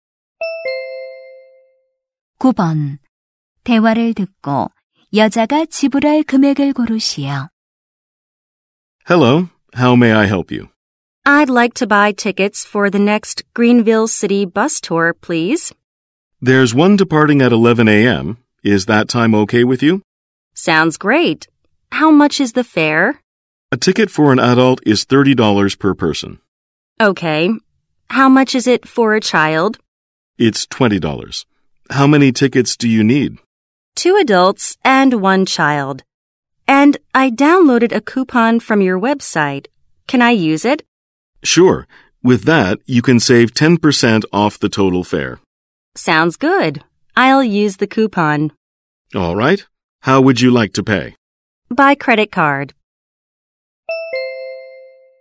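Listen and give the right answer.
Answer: $72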